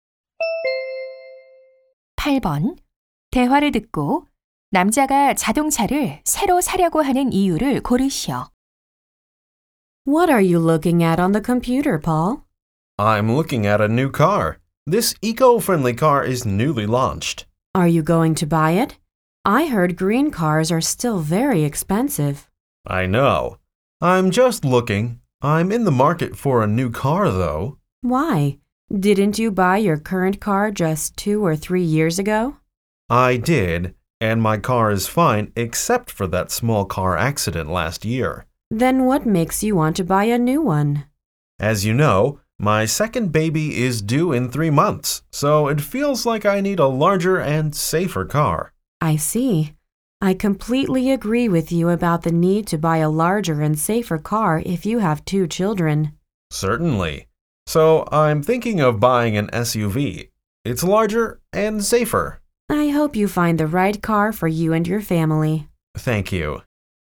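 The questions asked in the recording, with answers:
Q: 대화를 듣고 남자가 자동차를 새로 사려고 하는 이유를 고르시오.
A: 둘째 아이가 태어날 예정이라 더 크고 안전한 차가 필요해서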